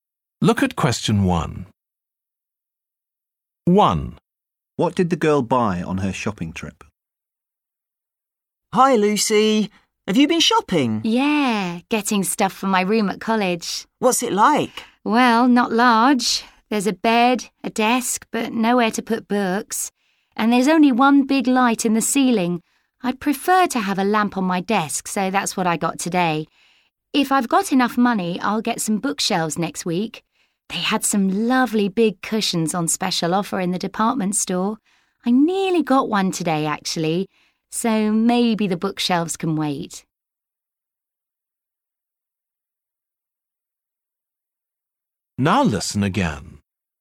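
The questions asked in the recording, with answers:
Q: What did the girl buy on her shopping trip?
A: a desk lamp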